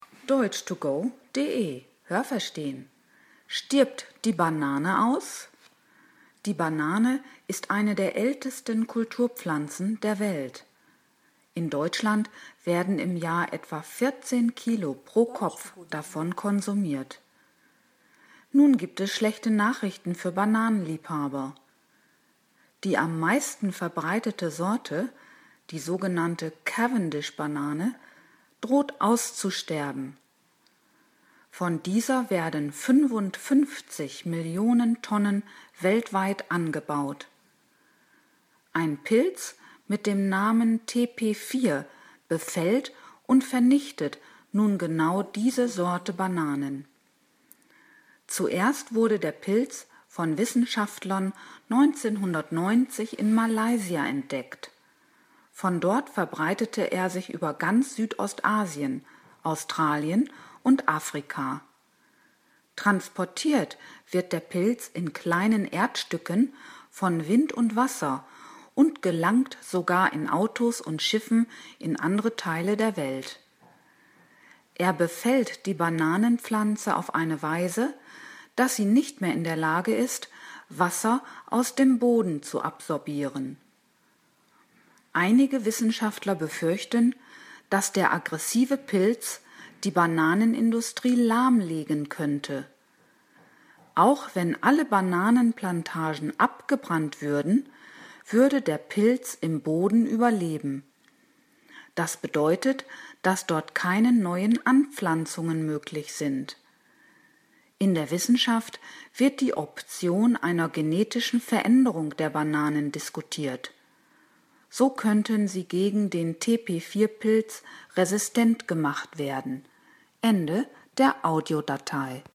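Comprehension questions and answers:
Was haben Sie gehört? Es gibt nur eine korrekte Antwort.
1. Jeder Deutsche konsumiert ...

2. Von der Cavendish-Banane werden 55 Millionen Tonnen ...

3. Der Pilz TP4 wurde schon ______ in Malaysia entdeckt.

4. Bei Pilzbefall kann die Bananenpflanze ...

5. Wissenschaftler diskutieren ...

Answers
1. etwa 14 Kilo Bananen pro Jahr
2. weltweit angebaut
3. 1990
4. kein Wasser mehr aus dem Boden absorbieren
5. eine genetische Veränderung der Bananen

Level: C (schwer)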